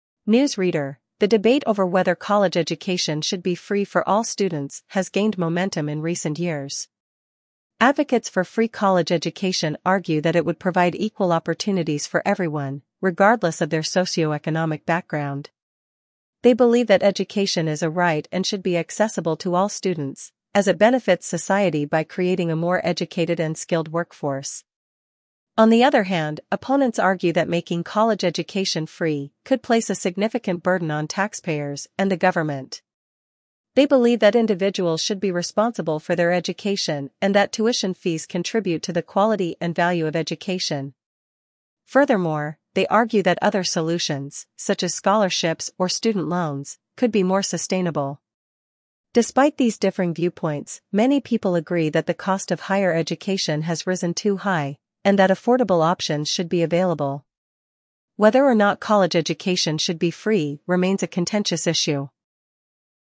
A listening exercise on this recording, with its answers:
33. What do advocates for free college education believe?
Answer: Education as a right

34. What is the main argument against free college education?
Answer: Taxpayer burden

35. What alternative solutions do opponents suggest?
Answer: Scholarships and loans

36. What do many people agree on regarding the cost of education?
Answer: High cost of education

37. Why is the issue of free college education controversial?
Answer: Disagreement

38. How do supporters view the impact of free college education on society?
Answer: Equal opportunities and skilled workforce

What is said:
News Reader: The debate over whether college education should be free for all students has gained momentum in recent years. Advocates for free college education argue that it would provide equal opportunities for everyone, regardless of their socio-economic background. They believe that education is a right and should be accessible to all students, as it benefits society by creating a more educated and skilled workforce.
On the other hand, opponents argue that making college education free could place a significant burden on taxpayers and the government. They believe that individuals should be responsible for their education and that tuition fees contribute to the quality and value of education. Furthermore, they argue that other solutions, such as scholarships or student loans, could be more sustainable.
Despite these differing viewpoints, many people agree that the cost of higher education has risen too high, and that affordable options should be available. Whether or not college education should be free remains a contentious issue.